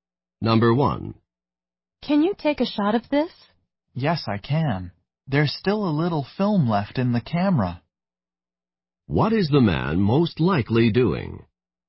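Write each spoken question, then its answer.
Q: What is the man most likely doing?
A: Taking a photograph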